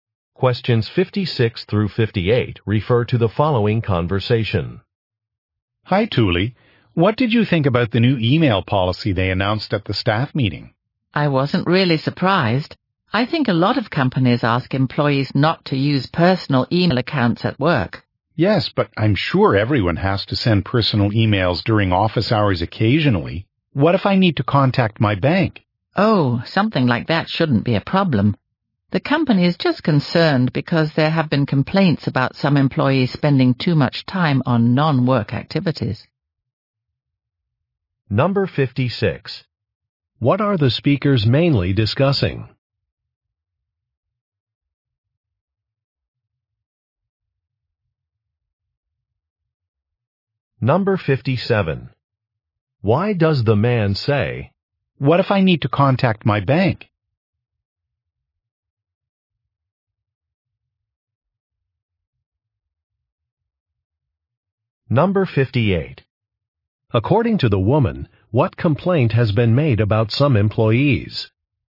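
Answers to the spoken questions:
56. A new email policy
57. To point out that personal emails are sometimes necessary
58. They spend too much time on non-work activities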